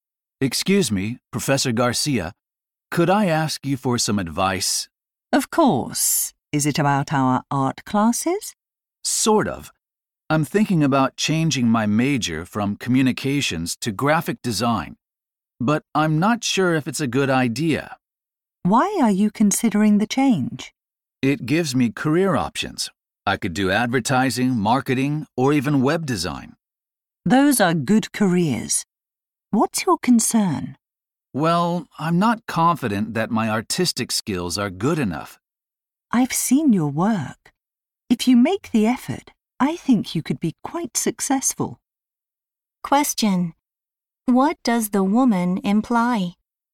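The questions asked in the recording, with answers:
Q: Question: What does the woman imply?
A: The man could succeed in graphic design if he makes the effort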